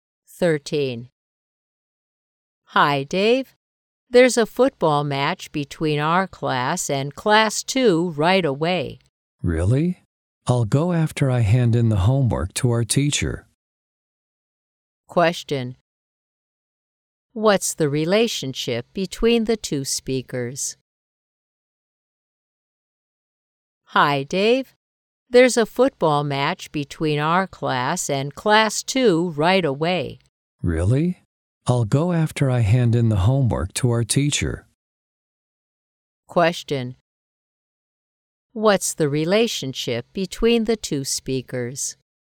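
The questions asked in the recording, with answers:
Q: What's the relationship between the two speakers?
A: Classmates.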